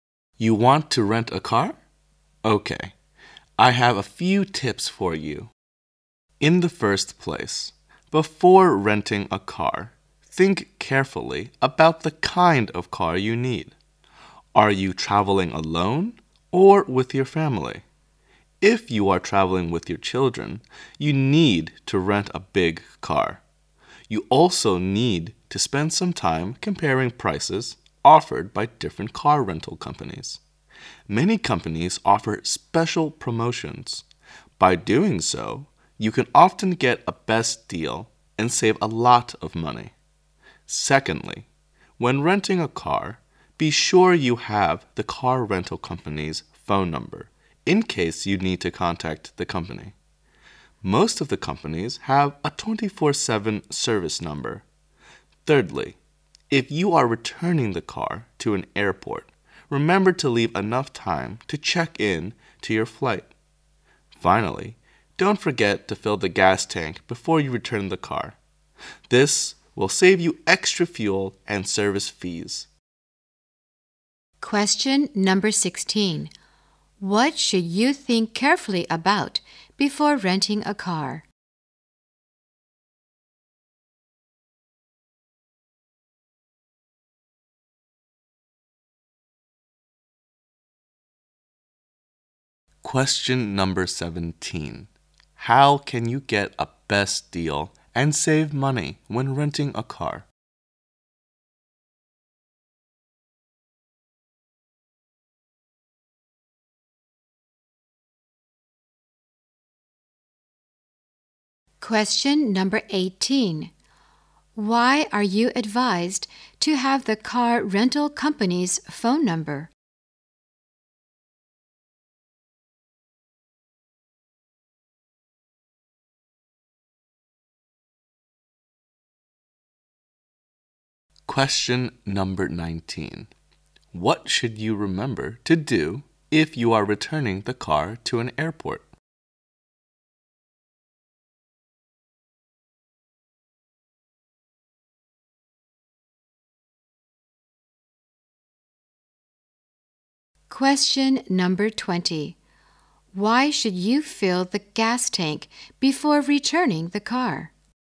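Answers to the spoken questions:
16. The kind of car you need
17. By comparing prices of different companies
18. In case you need to contact the company
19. Leave enough time to check in
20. To save extra fuel and service fees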